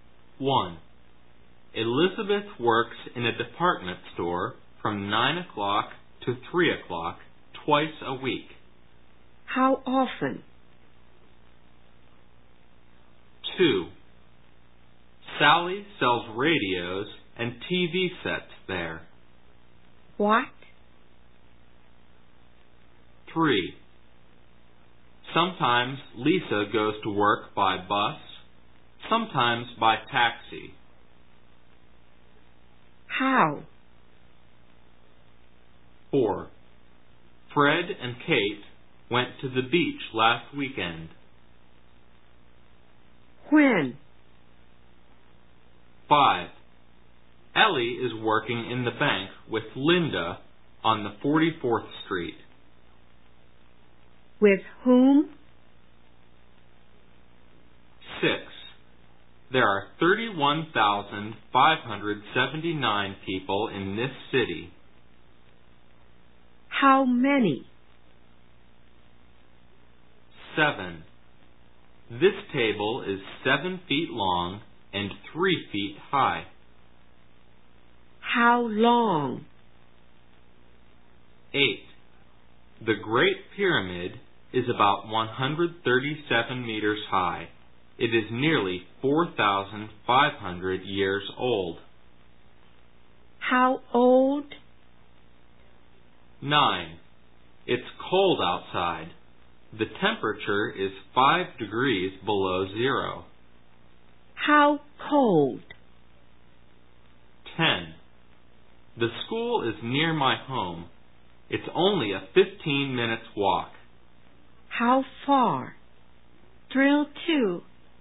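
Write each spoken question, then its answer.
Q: How often?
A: Twice a week

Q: What?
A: Radios and TV sets

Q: When?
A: Last weekend

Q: With whom?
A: With Linda

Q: How many?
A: 31,579 people

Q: How long?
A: 7 feet long

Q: How old?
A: Nearly 4,500 years old

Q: How cold?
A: 5 degrees below zero

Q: How far?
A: A 15-minute walk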